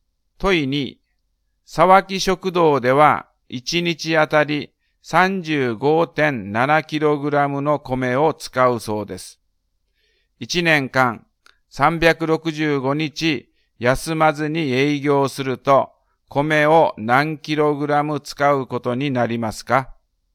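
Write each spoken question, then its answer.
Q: 1年間365日休まずに営業すると米を何 kg 使うことになりますか?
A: 13030.5kg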